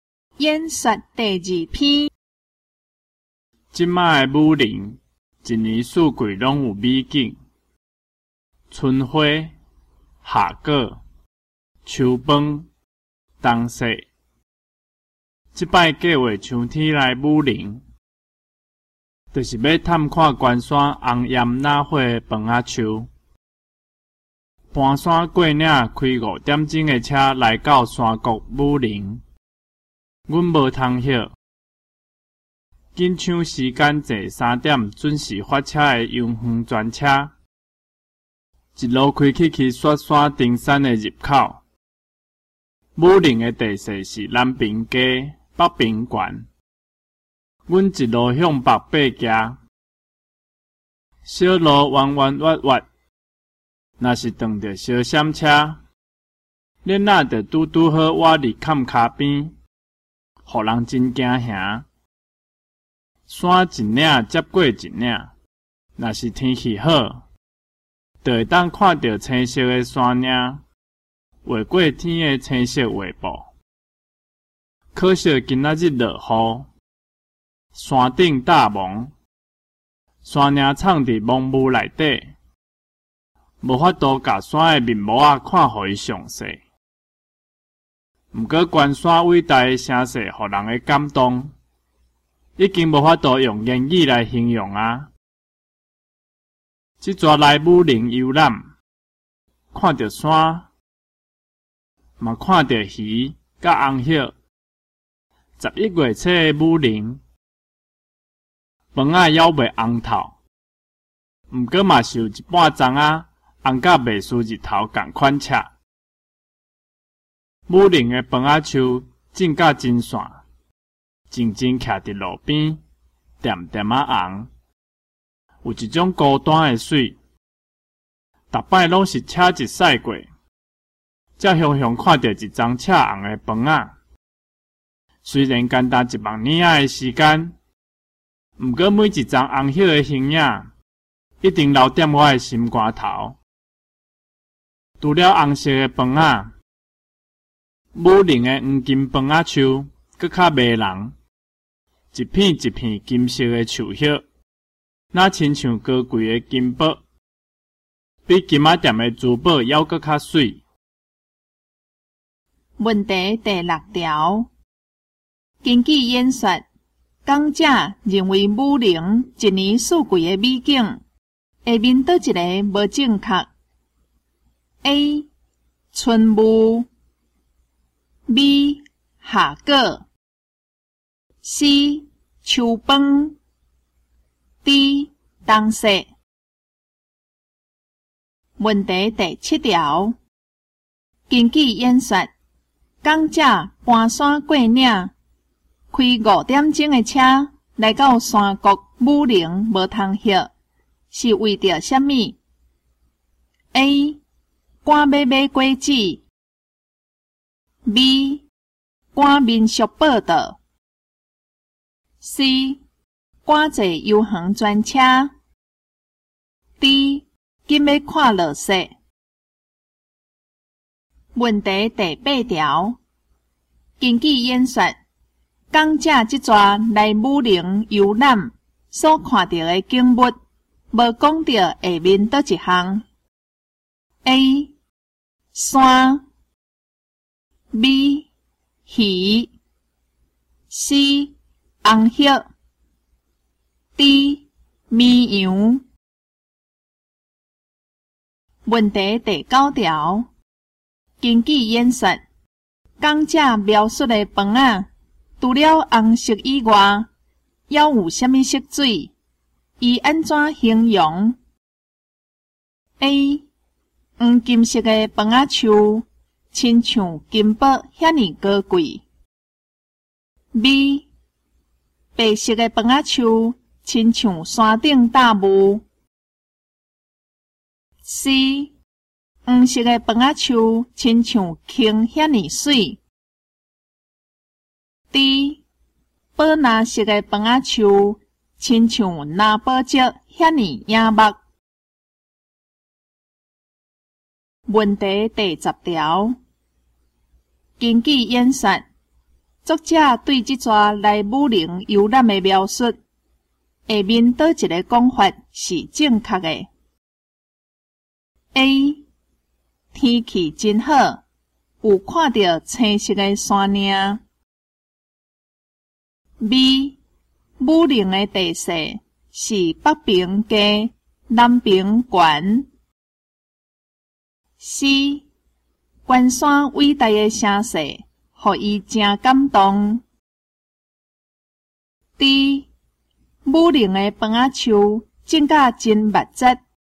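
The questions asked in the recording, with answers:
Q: 根据演说,讲者认为武陵一年四季的美景,下面倒一个无正确。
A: A: 春雾

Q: 根据演说,讲者搬山过岭,开五点钟的车来到山谷武陵无通歇,是为着什么 ?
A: C: 赶坐游园专车

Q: 根据演说。讲者即逝来武陵游览所看到的景物,无讲到下面倒一项 :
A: D: 绵羊

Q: 除了红色以外,要有什么色水?以安怎形容 ?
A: A: 黄金色的饭仔树,亲像金箔遐尼高贵

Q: 根据演说,作者对这逝来武陵游览的描述,下面倒一个讲法是正确的 ?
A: C: 关山伟大的声势,予伊真感动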